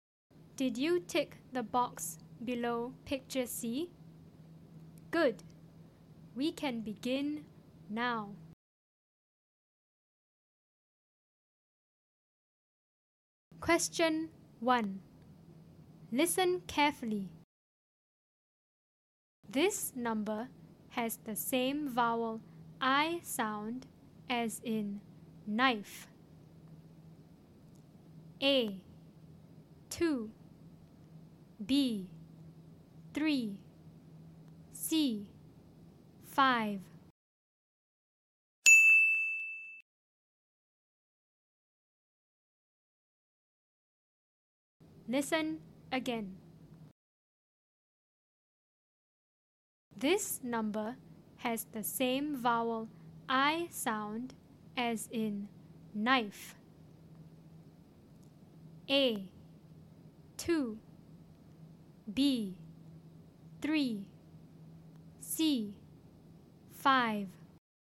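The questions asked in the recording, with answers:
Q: This number has the same vowel I sound as in knife.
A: C: 5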